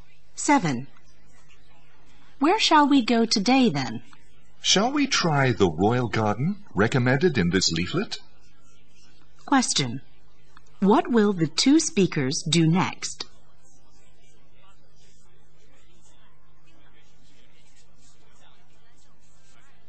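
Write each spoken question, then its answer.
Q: What will the 2 speakers do next?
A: Visit the Royal Garden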